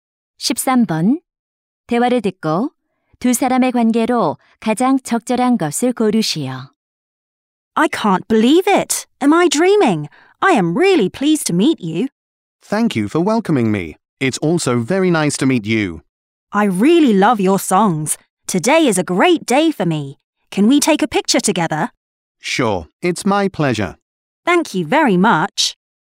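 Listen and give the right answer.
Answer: 가수와 팬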